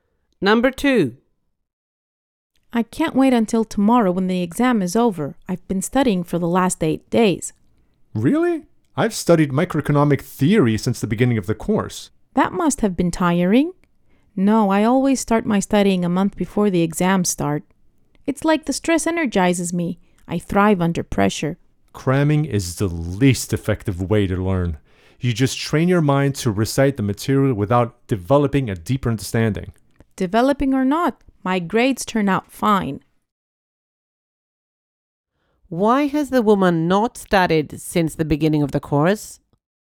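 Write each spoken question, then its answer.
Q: Why has the woman not studied since the beginning of the course?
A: She works well under pressure; the stress gives her energy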